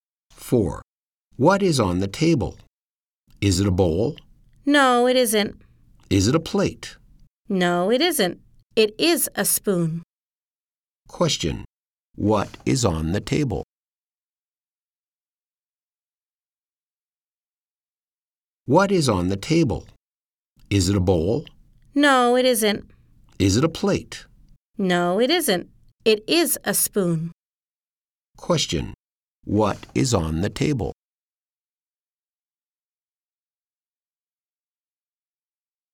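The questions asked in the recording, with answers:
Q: What is on the table?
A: A spoon.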